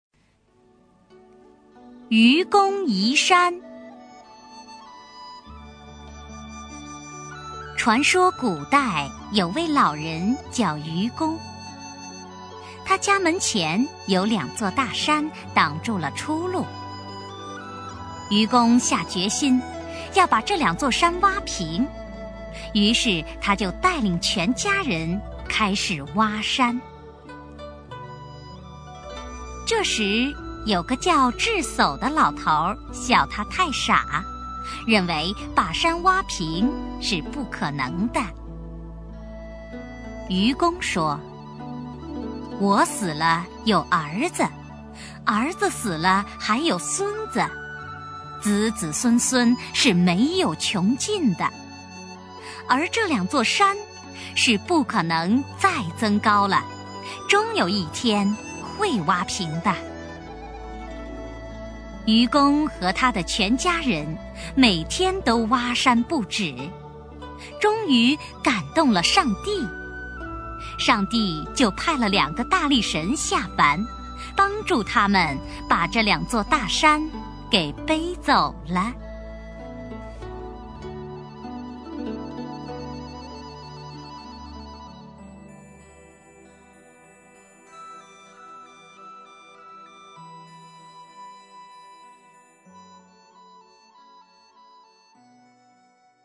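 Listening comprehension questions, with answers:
★音声を聞き、空欄〇に当てはまる単語を探して、授業内課題用紙に漢字とピンインを書いてください。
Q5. 于是他就带领全家人〇〇挖山。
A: 开始

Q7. 1〇〇大山挖平是不2〇〇的。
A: 1认为 2可能

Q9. "我死了,有〇〇,〇〇死了,还有孙子。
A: 儿子

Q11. 而这两座山是不〇〇再增高了。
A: 可能

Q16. 〇〇他们把这两座大山给背走了。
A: 帮助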